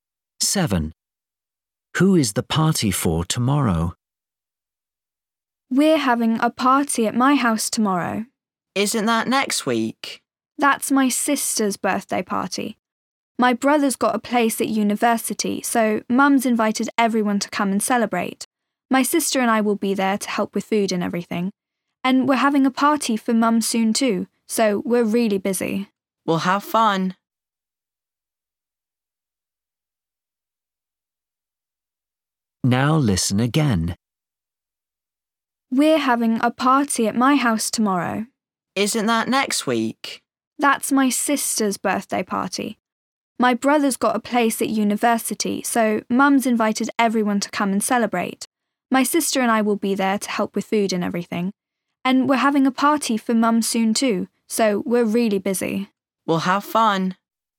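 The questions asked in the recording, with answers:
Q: Who is the party for tomorrow?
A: Her brother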